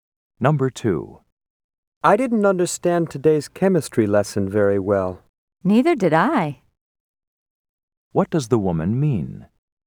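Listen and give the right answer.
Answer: She didn't understand the chemistry lesson either.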